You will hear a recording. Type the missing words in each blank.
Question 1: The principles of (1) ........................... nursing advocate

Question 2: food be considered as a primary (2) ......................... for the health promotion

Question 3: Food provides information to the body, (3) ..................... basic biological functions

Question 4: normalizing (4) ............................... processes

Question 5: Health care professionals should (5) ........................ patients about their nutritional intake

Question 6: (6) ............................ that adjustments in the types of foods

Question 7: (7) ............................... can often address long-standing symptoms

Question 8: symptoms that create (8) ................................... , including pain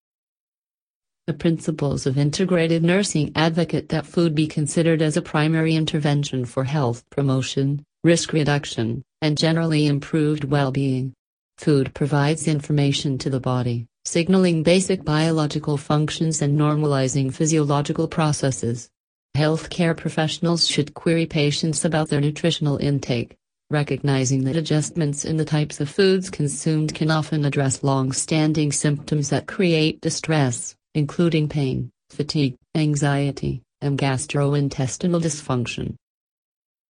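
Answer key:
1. integrated
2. intervention
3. signaling
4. physiological
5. query
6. recognizing
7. consumed
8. distress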